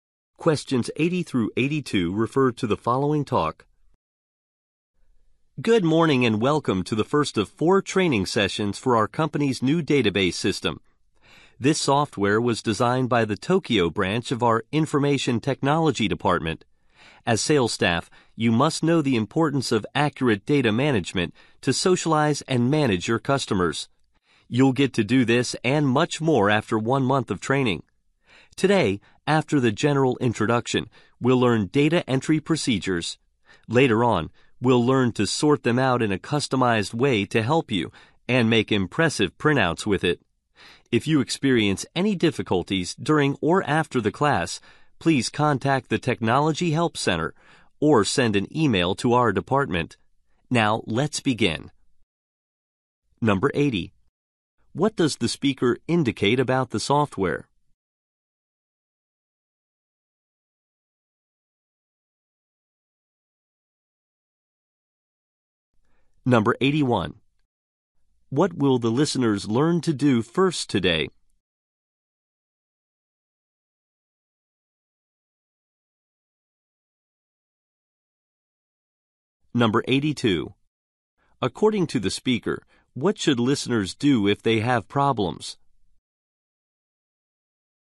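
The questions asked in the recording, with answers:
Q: What will the listeners learn to do first today?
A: Data entry procedures

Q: According to the speaker, what should listeners do if they have problems?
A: Contact the Technology Help Center or email the department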